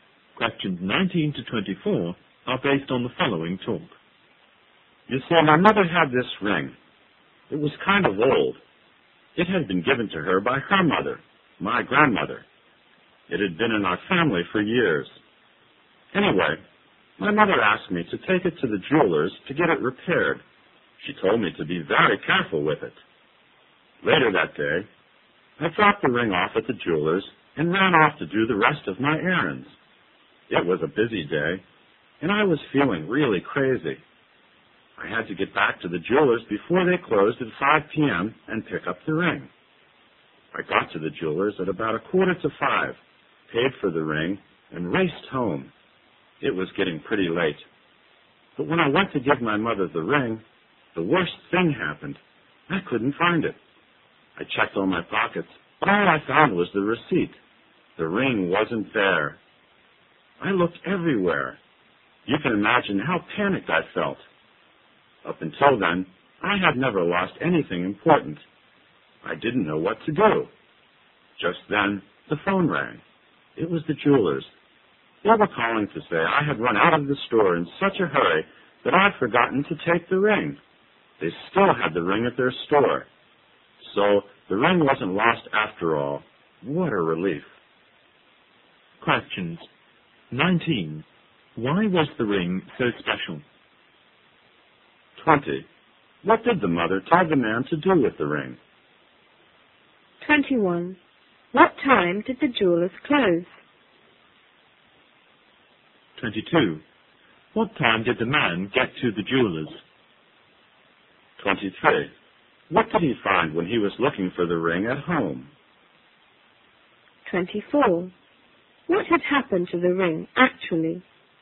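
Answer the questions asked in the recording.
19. It had been in the family for years, from his grandmother
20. Take it to the jeweler's to be repaired
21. 5 p.m.
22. About 4:45
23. Only the receipt
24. He had left it at the jeweler's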